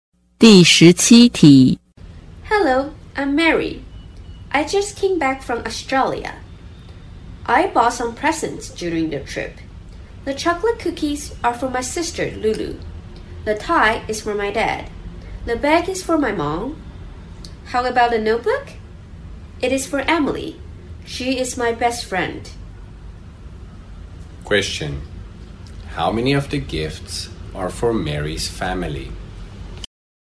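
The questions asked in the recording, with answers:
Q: Question. How many of the gifts are for Mary's family?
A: Three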